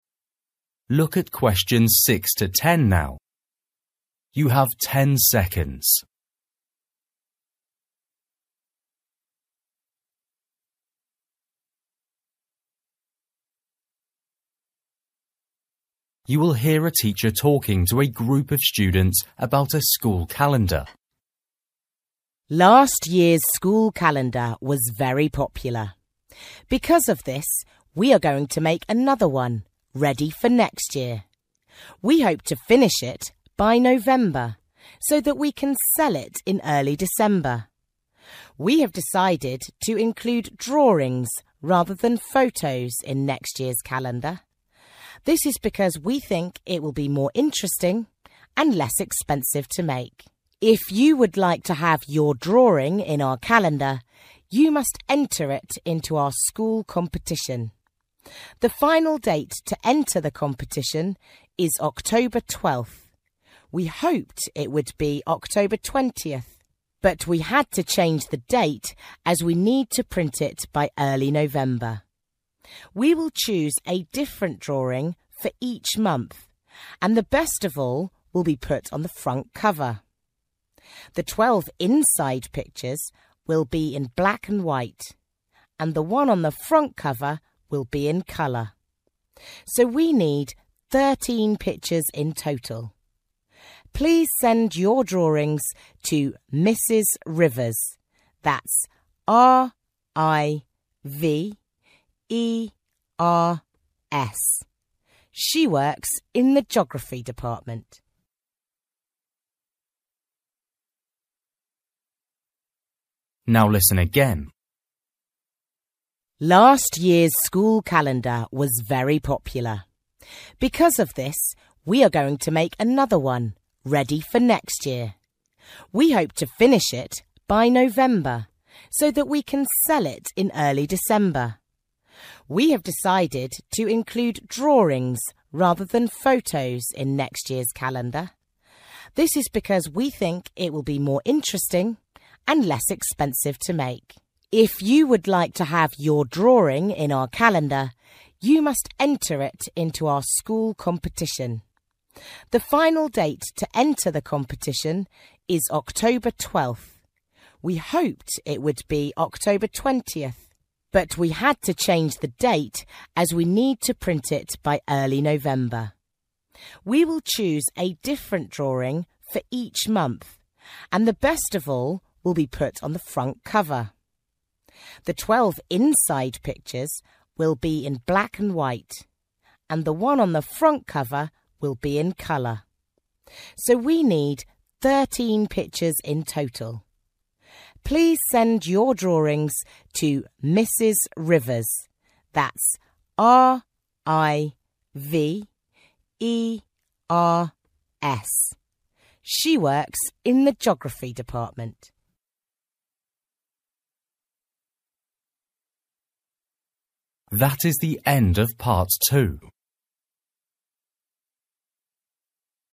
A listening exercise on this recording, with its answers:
For each question, write the correct answer in the gap. Write one word or a number or a date or a time.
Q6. Start to sell calendars in:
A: December

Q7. Last date to enter competition:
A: 12th October

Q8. in ........................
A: colour

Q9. Total number of pictures:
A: 13

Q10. Mrs ........................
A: Rivers

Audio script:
Woman: Last year's school calendar was very popular. Because of this, we are going to make another one, ready for next year. (6) We hope to finish it by November, so that we can sell it in early December. We have decided to include drawings, rather than photos, in next year's calendar. This is because we think it will be more interesting and less expensive to make.
If you would like to have your drawing in our calendar, you must enter it into our school competition. (7) The final date to enter the competition is October 12th. We hoped it would be October 20th, but we had to change the date as we need to print it by early November. We will choose a different drawing for each month and the best of all will be put on the front cover. The 12 inside pictures will be in black and white, and (8) the one on the front cover will be in colour. So (9) we need 13 pictures in total. (10) Please send your drawings to Mrs. Rivers. That's R-I-V-E-R-S. She works in the geography department.

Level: KET (A2)